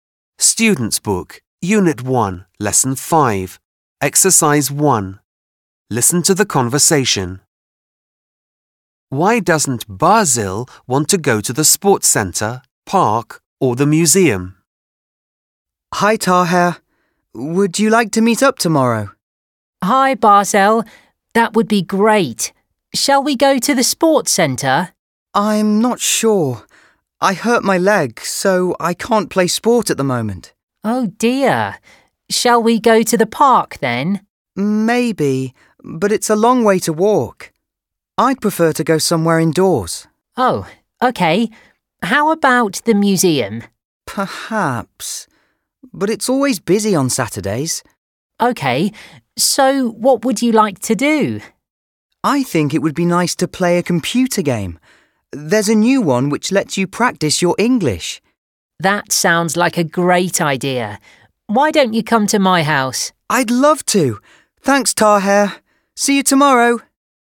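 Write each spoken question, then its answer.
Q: Why doesn't Basil want to go to the sports centre, park or the museum?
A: He hurt his leg so he can't play sport, the park is a long way to walk and he'd prefer somewhere indoors, and the museum is always busy on Saturdays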